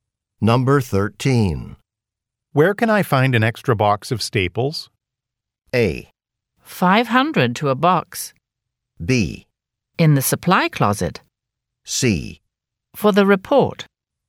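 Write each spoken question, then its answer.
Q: Where can I find an extra box of staples?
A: B: In the supply closet.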